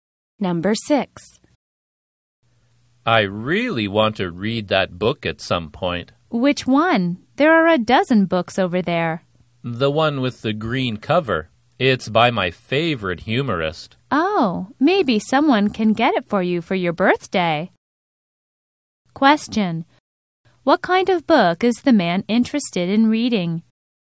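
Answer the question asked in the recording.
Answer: A humorous book by his favorite humorist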